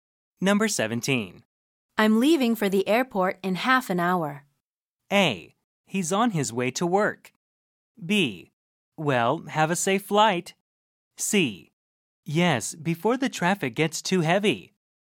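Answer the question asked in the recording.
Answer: B: Well, have a safe flight.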